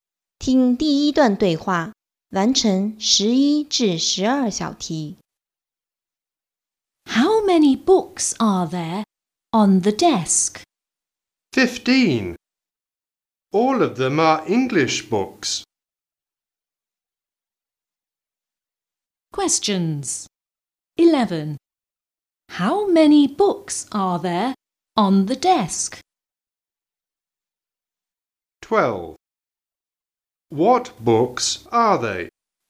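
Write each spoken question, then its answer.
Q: What books are they?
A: English books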